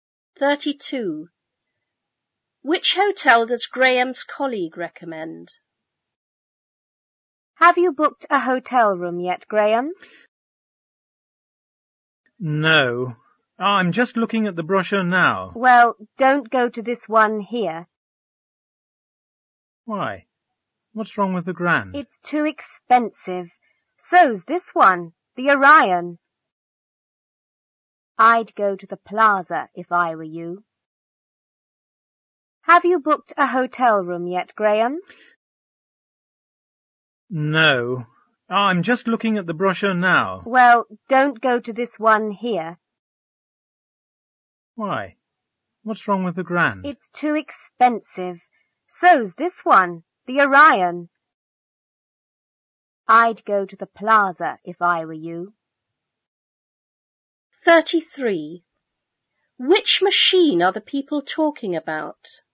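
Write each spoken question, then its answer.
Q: Which hotel does Graham's colleague recommend?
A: The Plaza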